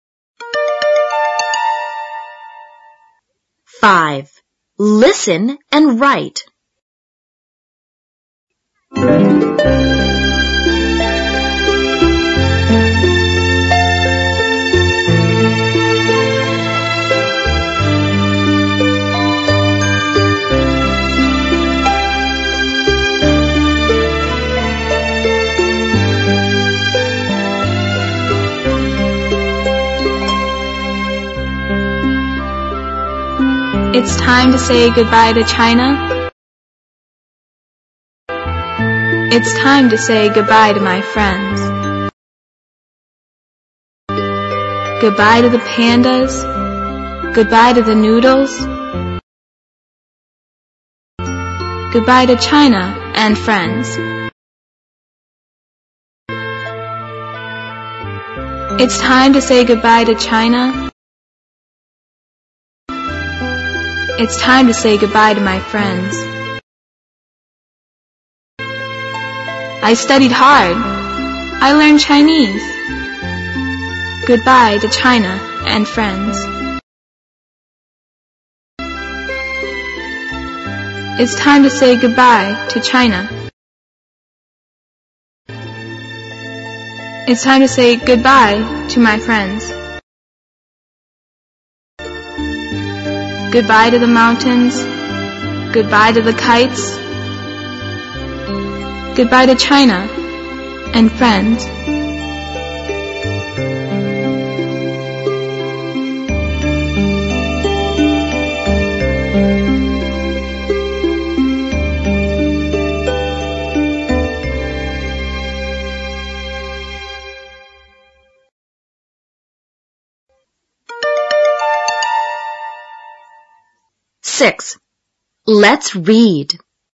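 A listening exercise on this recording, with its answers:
5.Listen and write.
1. It's time to say goodbye to ________.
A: China

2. It's time to say goodbye to my _______.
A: friends

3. I studied hard.I learned ________.Goodbye to China and friends.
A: Chinese

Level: 小学英语六年级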